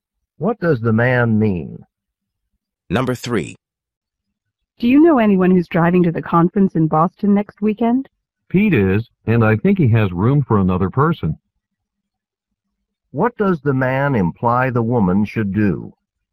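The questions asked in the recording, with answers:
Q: What does the man imply the woman should do?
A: Ask Pete for a ride to the conference.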